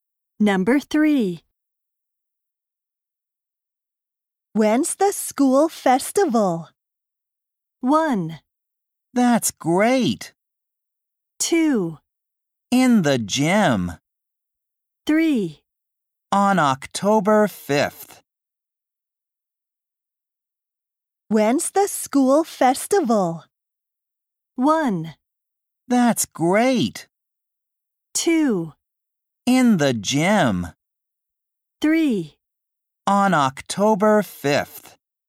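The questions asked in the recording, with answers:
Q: When's the school festival?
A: 3: On October 5th.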